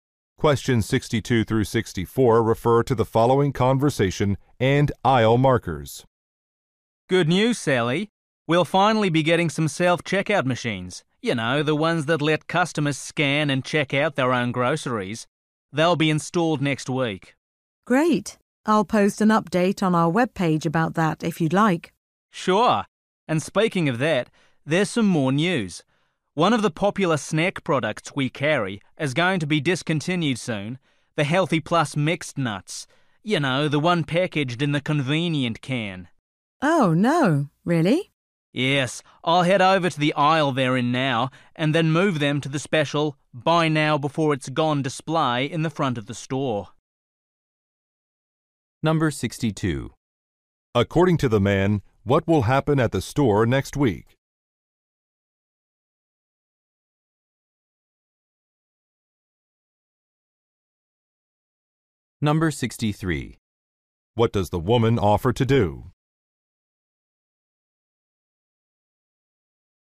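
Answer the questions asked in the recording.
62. Self-checkout machines will be installed
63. Post an update on the webpage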